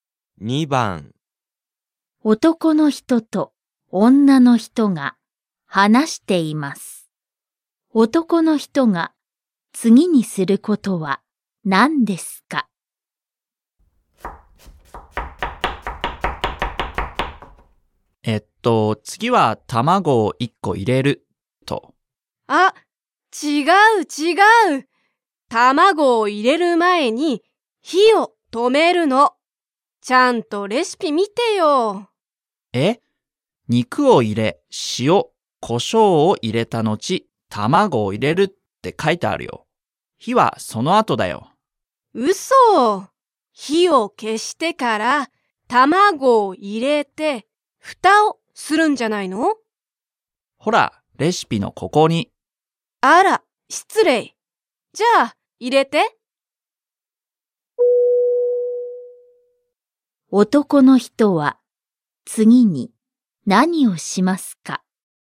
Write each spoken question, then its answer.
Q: 男の人は、次に何をしますか?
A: 1. Choice 1. 卵を入れる。